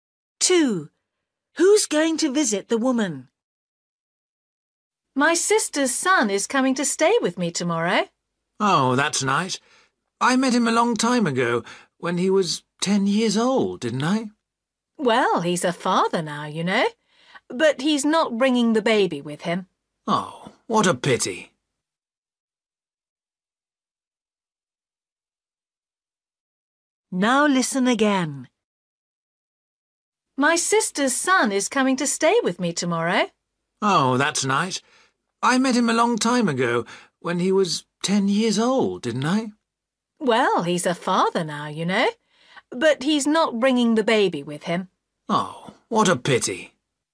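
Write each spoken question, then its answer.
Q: Who's going to visit the woman?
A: Her sister's son (her nephew)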